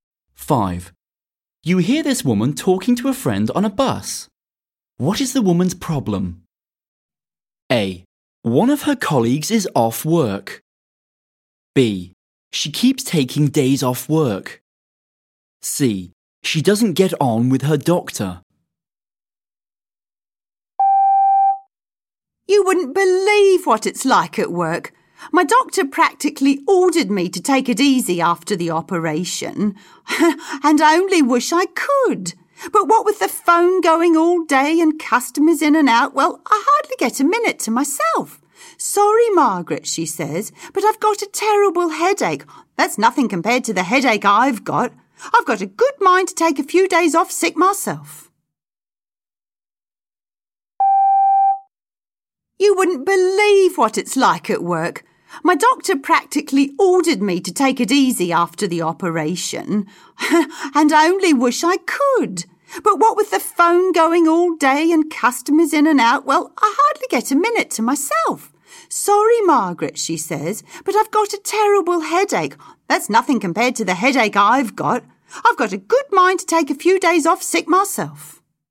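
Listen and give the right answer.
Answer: A: One of her colleagues is off work.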